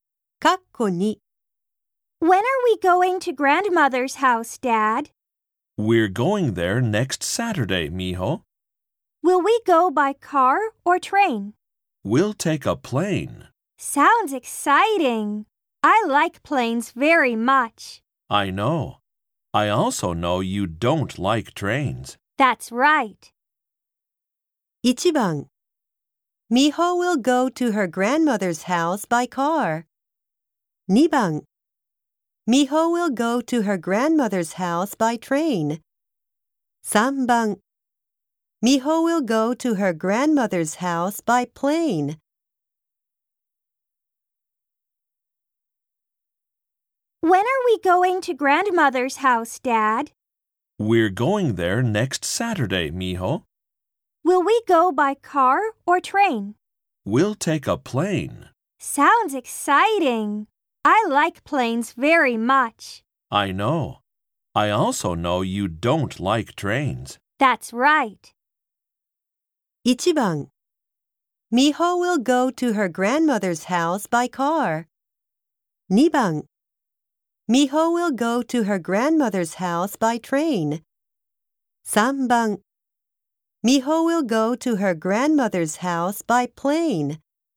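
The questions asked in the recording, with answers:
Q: 1番 Mijo will go to her grandmother's house by car. 2番 Mijo will go to her grandmother's house by train. 3番 Mijo will go to her grandmother's house by plane.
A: 3: Mijo will go to her grandmother's house by plane.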